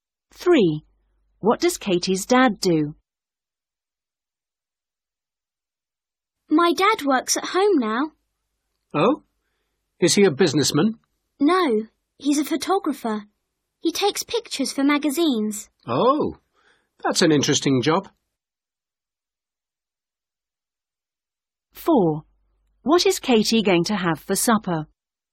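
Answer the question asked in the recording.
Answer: He's a photographer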